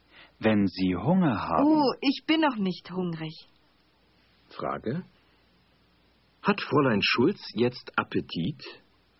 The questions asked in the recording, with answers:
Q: Frage. Hat Fräulein Schulz jetzt Appetit?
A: Nein, sie hat noch keinen Appetit.